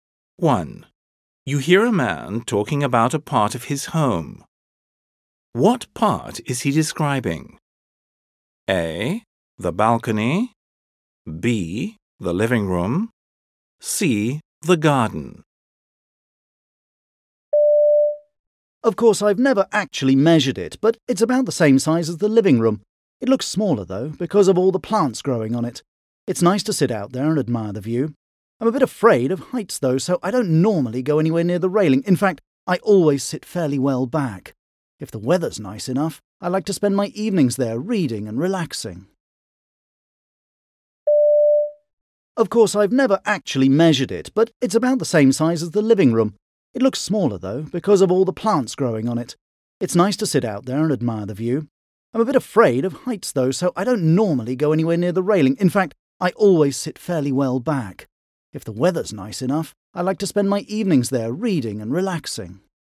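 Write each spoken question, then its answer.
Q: What part is he describing?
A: A: The balcony.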